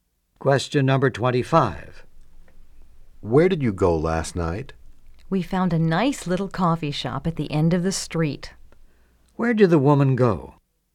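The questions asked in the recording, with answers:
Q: Where did the woman go?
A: To a coffee shop.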